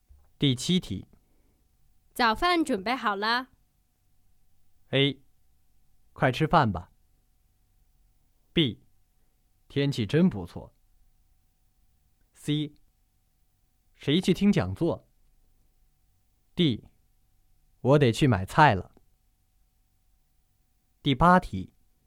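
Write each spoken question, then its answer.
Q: 早饭准备好了。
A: A: 快吃饭吧。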